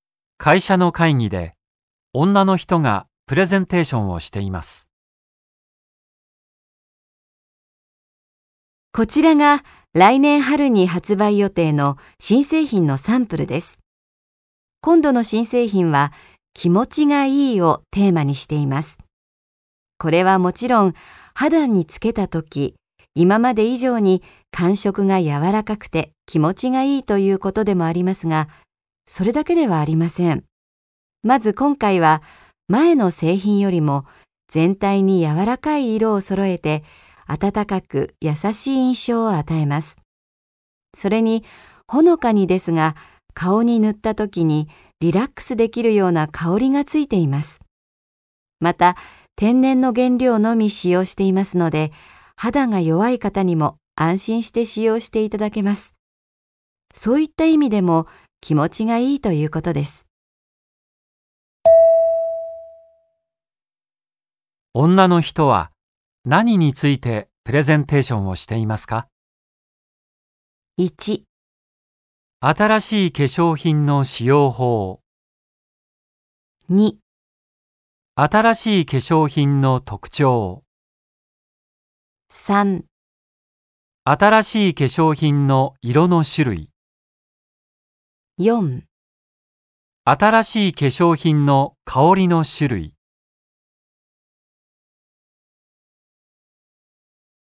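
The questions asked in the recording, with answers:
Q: 女の人は何についてプレゼンテーションをしていますか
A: 2: 新しい化粧品の特徴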